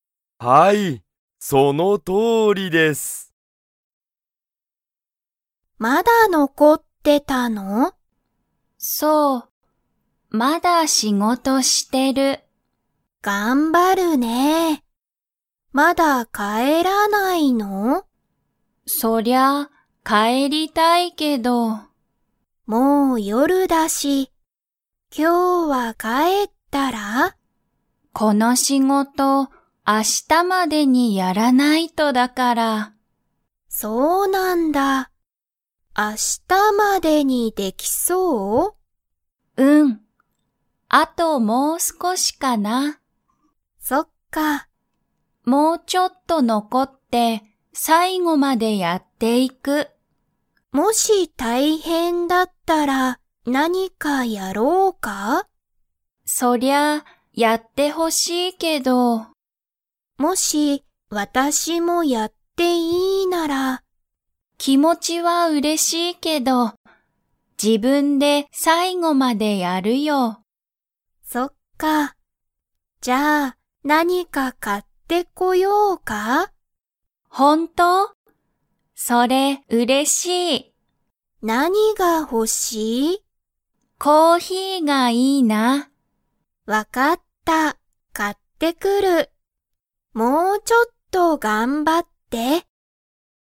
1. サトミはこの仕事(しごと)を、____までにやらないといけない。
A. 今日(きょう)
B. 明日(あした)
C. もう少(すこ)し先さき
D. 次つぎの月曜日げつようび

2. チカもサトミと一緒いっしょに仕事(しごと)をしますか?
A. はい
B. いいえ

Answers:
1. B
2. B

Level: Level 2

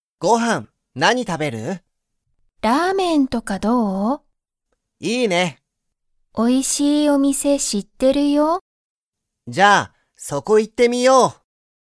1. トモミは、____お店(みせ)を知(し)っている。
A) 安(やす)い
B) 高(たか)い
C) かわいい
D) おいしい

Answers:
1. D

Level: Level 1

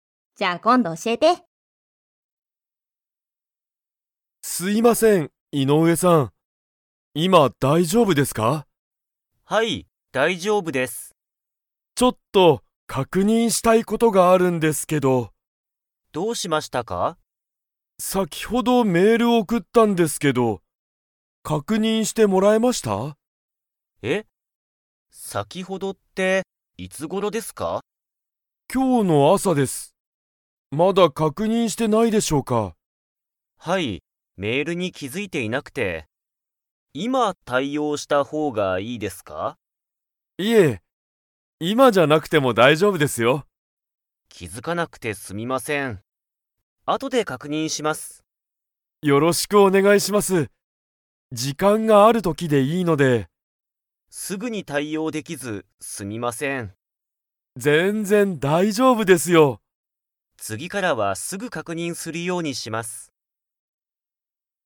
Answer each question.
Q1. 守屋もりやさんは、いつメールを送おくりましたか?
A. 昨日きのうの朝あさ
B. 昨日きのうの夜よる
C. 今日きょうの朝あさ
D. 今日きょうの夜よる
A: C

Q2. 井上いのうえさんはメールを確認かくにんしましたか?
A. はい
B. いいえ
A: B

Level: Level 3

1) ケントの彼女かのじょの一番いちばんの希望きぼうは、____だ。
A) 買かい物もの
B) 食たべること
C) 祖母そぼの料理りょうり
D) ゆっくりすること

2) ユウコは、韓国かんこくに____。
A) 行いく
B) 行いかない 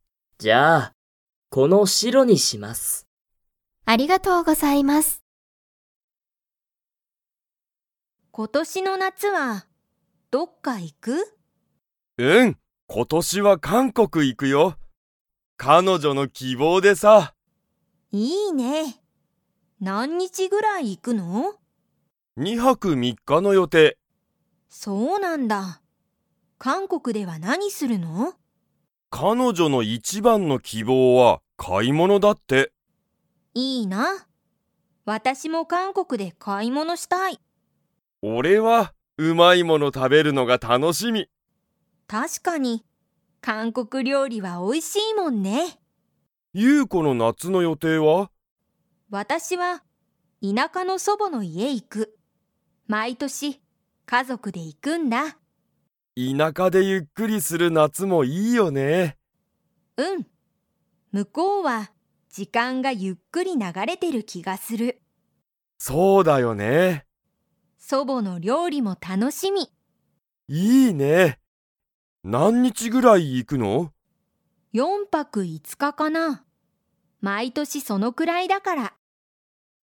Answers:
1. A
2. B

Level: Level 4

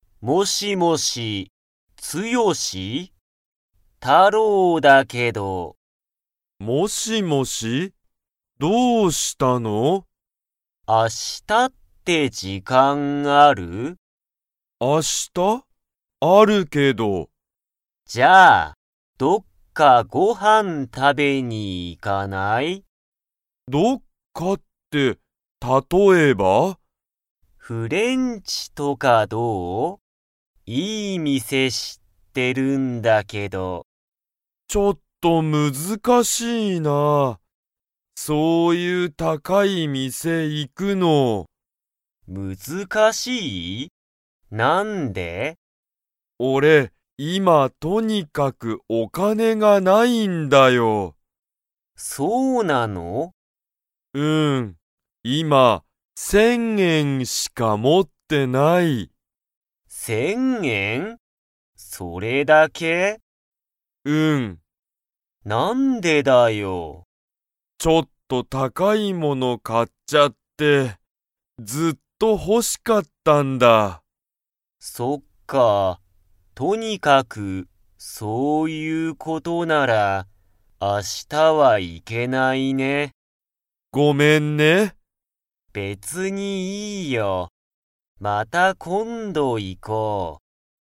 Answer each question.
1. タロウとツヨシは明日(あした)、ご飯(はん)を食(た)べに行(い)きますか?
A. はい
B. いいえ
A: B

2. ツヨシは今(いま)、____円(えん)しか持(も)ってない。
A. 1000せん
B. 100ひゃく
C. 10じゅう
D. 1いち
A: A

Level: Level 2

